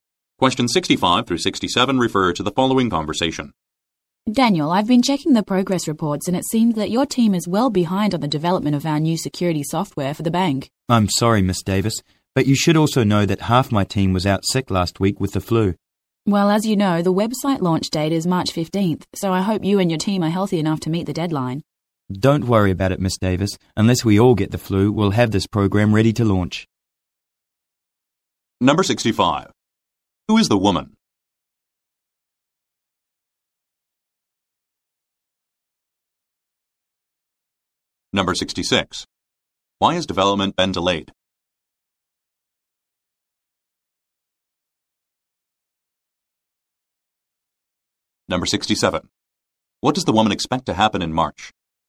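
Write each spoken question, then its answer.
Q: Why has development been delayed?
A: Half the team was out sick with the flu

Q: What does the woman expect to happen in March?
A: The website launch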